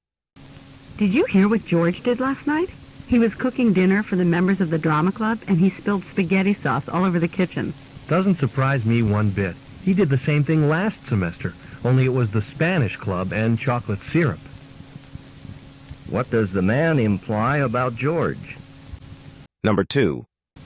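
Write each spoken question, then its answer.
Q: What does the man imply about George?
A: George has had similar accidents before; he is careless.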